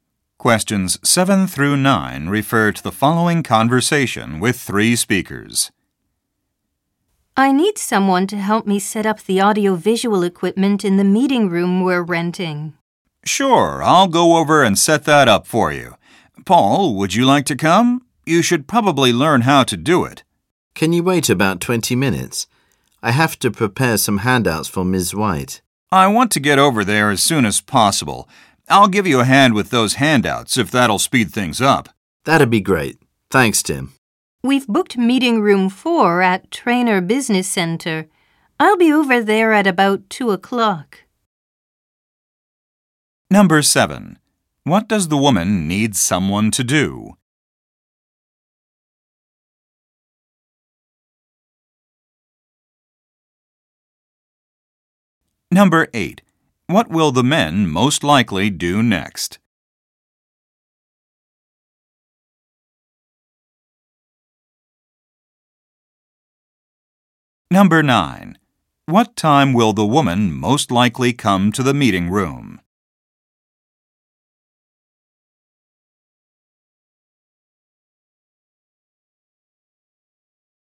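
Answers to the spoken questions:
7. Help set up audiovisual equipment in the meeting room
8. Prepare handouts for Ms. White
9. About 2 o'clock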